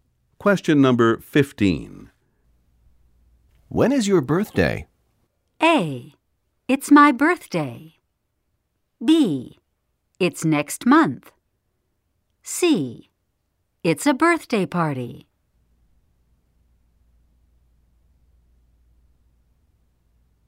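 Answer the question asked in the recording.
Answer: B: It's next month.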